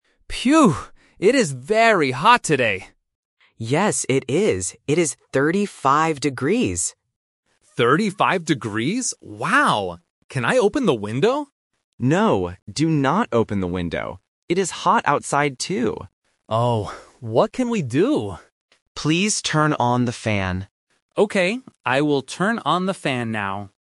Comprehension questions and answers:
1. What is the temperature today?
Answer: 35 degrees

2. What does Ben want to open?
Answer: The window

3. What will Ben do at the end?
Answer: Turn on the fan

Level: A1